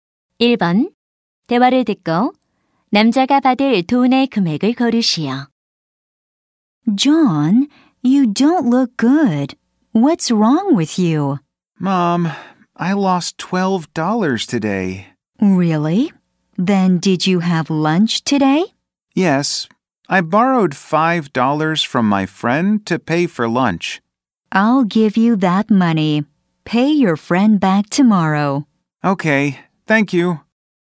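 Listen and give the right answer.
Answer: 5달러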